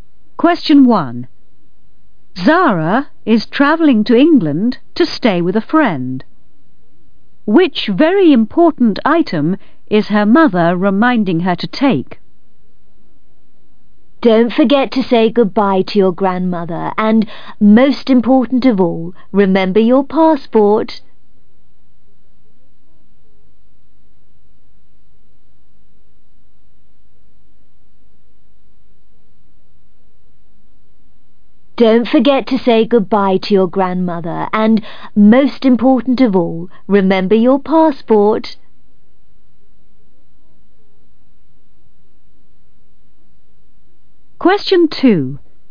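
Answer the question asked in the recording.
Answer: Her passport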